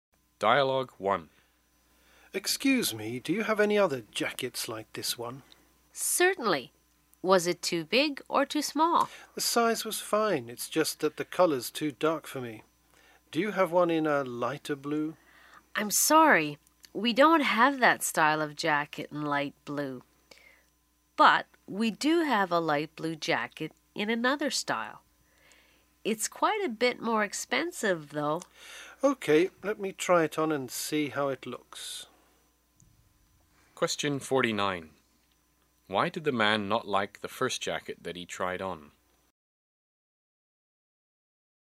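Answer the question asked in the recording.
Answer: The colour was too dark for him.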